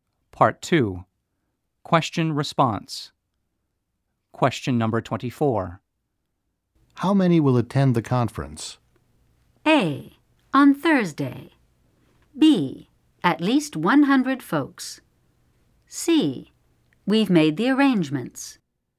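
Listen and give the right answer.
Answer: B: At least 100 folks.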